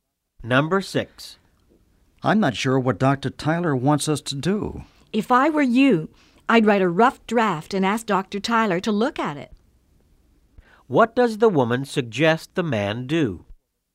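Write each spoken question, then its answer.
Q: What does the woman suggest the man do?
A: Write a rough draft and ask Dr. Tyler to look at it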